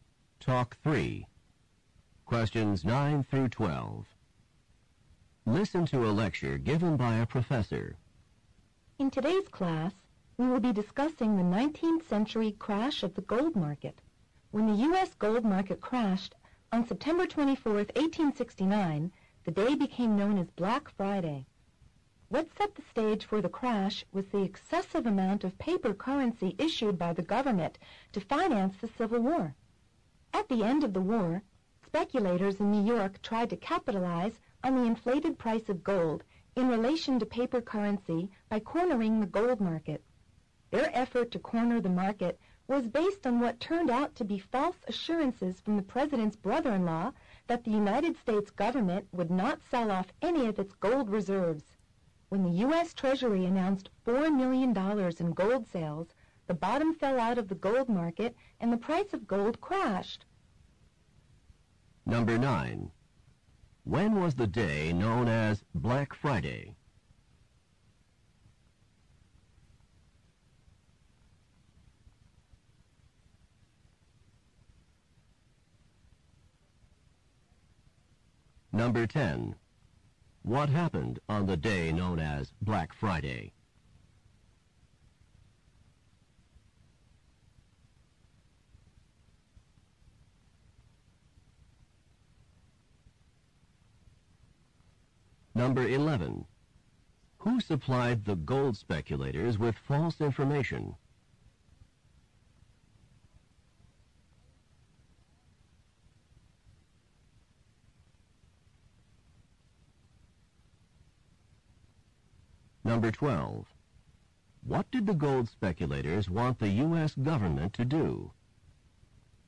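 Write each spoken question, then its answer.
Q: When was the day known as Black Friday?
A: September 24, 1869

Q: What happened on the day known as Black Friday?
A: The U.S. gold market crashed

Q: Who supplied the gold speculators with false information?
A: The president's brother-in-law

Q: What did the gold speculators want the U.S. government to do?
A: Not sell any of its gold reserves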